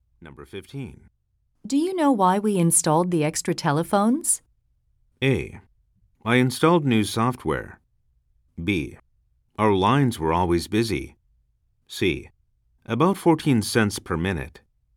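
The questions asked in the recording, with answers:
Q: Do you know why we installed the extra telephones?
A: B: Our lines were always busy.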